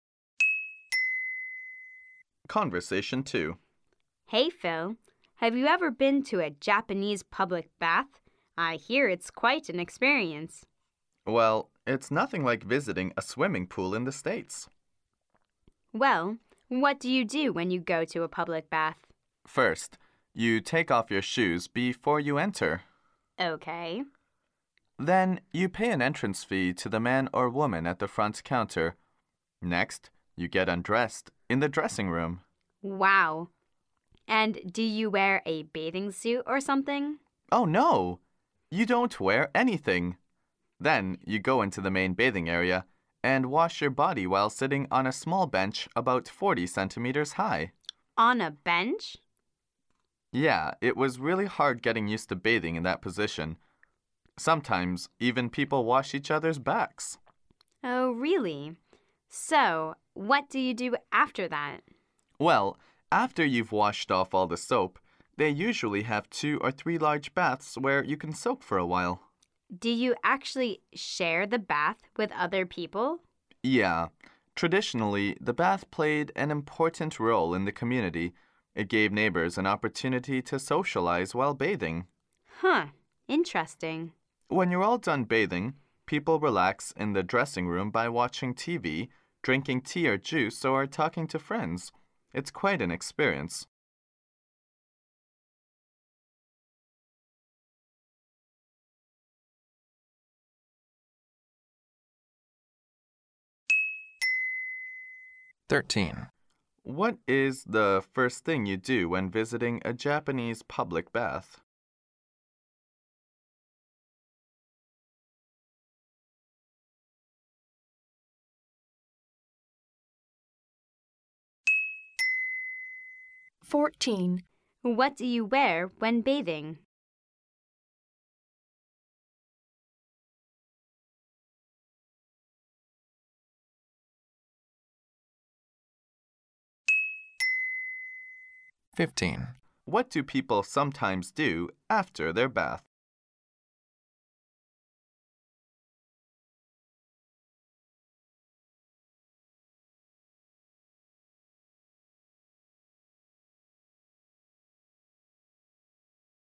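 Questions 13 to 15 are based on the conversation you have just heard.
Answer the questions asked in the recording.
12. Take off your shoes
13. Nothing
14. Relax in the dressing room watching TV, drinking tea or juice, or talking to friends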